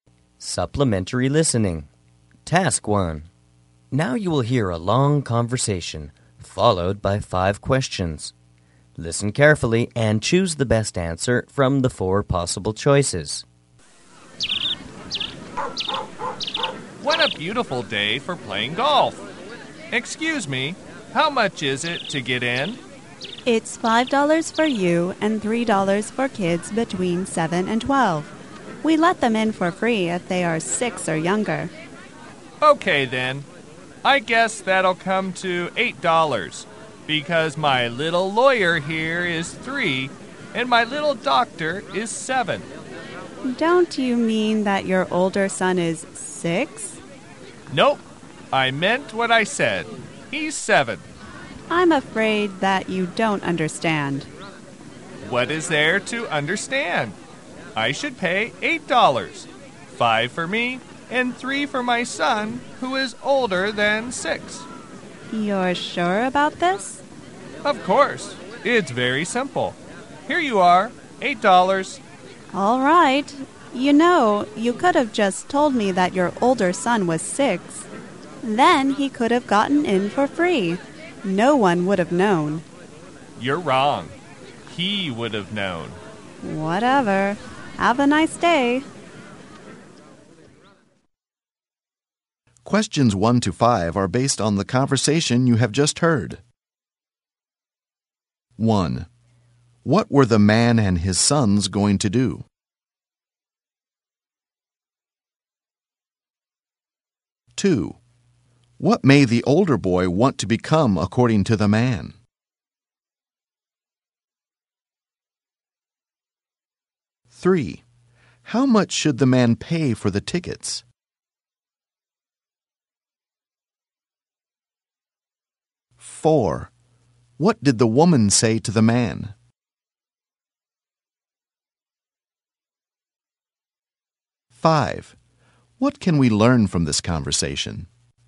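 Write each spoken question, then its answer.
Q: What were the man and his sons going to do?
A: Play golf.

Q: What may the older boy want to become according to the man?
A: A doctor.

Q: What did the woman say to the man?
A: He could have said his older son was 6 and got him in free; no one would have known.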